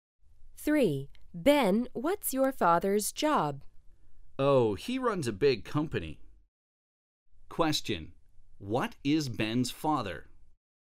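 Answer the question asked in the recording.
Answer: He runs a big company (a businessman/manager)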